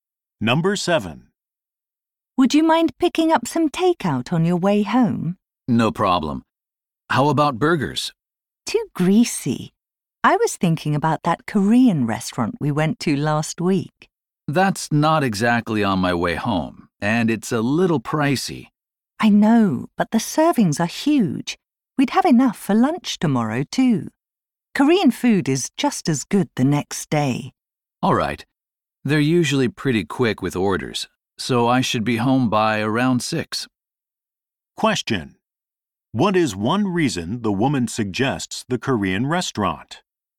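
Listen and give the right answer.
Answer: The servings are big enough for lunch the next day too.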